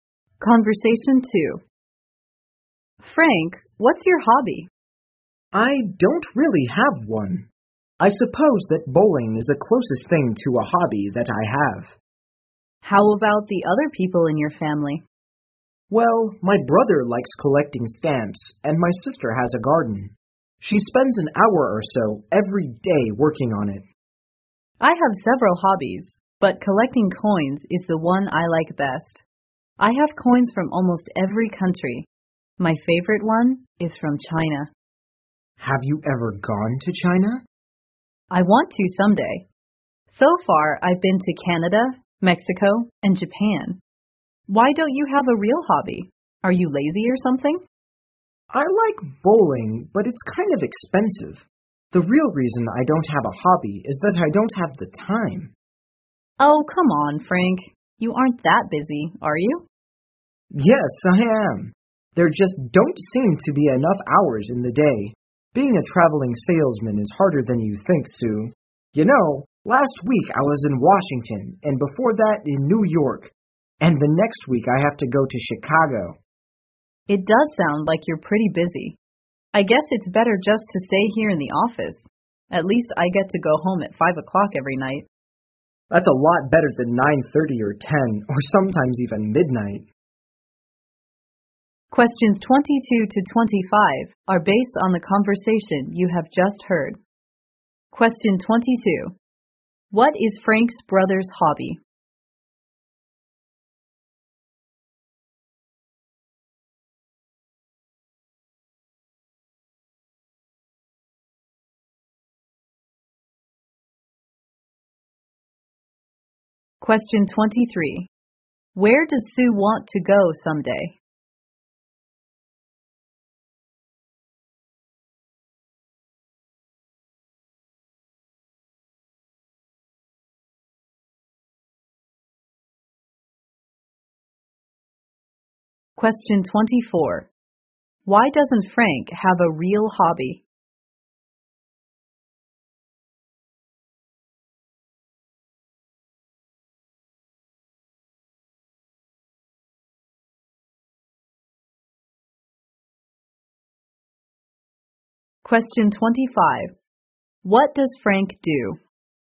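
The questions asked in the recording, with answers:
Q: What is Frank's brother's hobby?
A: Collecting stamps

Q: Where does Sue want to go someday?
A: China

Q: Why doesn't Frank have a real hobby?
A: He doesn't have the time

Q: What does Frank do?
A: He is a traveling salesman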